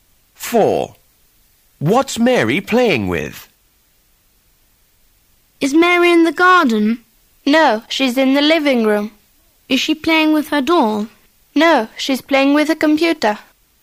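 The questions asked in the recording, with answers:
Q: What's Mary playing with?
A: A computer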